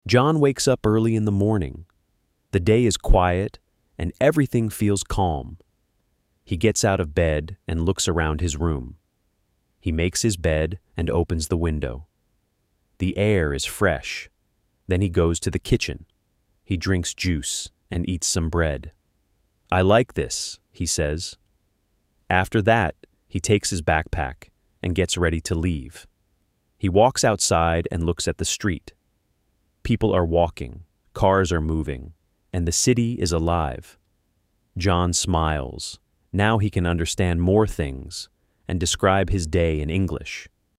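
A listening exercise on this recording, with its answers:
Responda em inglês:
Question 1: What time does John wake up?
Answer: Early in the morning.

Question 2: What does he do in his room?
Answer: He makes his bed and opens the window.

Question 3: What does he eat?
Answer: Some bread.

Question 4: Where does he go after?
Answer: To the kitchen.

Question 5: What does he see outside?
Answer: People walking, cars moving, the city alive.

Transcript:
John wakes up early in the morning. The day is quiet, and everything feels calm.
He gets out of bed and looks around his room.
He makes his bed and opens the window.
The air is fresh.
Then he goes to the kitchen.
He drinks juice and eats some bread.
"I like this," he says.
After that, he takes his backpack and gets ready to leave.
He walks outside and looks at the street.
People are walking, cars are moving, and the city is alive.
John smiles.
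Now he can understand more things and describe his day in English.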